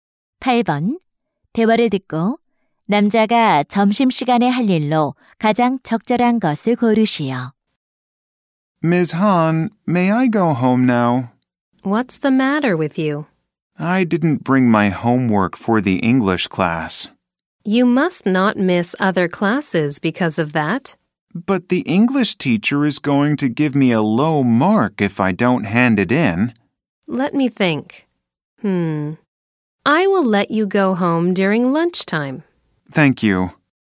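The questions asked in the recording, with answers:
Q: 대화를 듣고 남자가 점심 시간에 할 일로 가장 적절한 것을 고르시오.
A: 집에 가서 영어 숙제 가져오기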